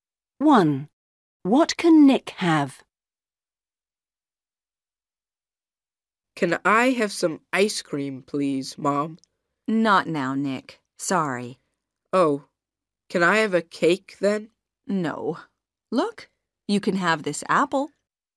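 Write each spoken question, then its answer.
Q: What can Nick have?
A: an apple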